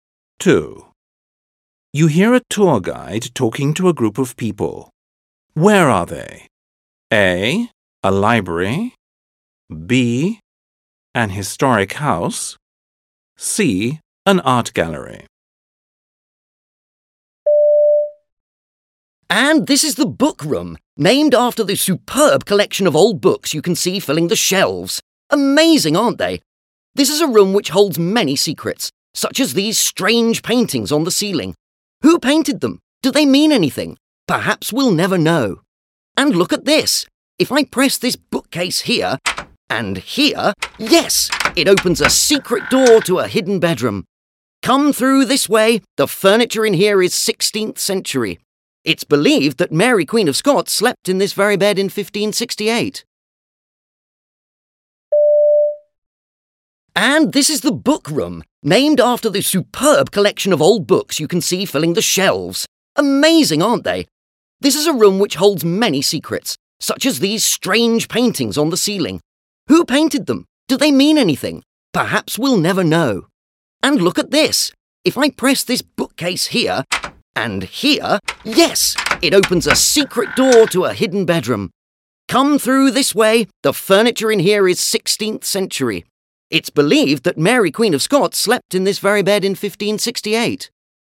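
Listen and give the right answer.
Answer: B: An historic house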